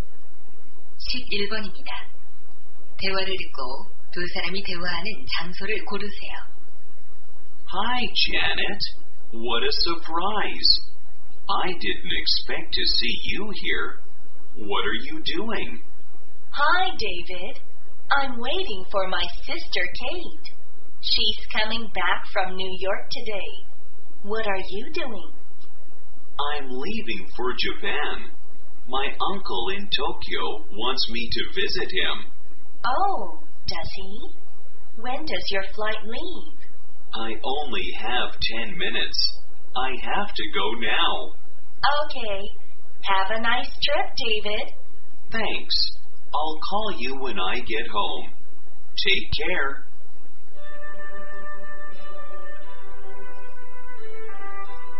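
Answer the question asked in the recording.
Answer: 공항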